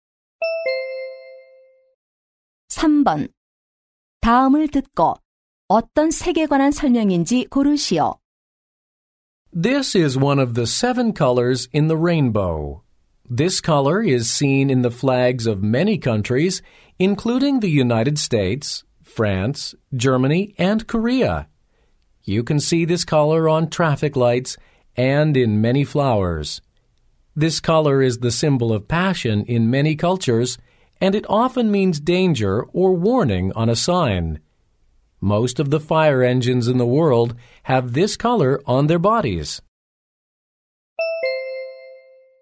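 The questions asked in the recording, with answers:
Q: 다음을 듣고 어떤 색에 관한 설명인지 고르시오.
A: 빨간색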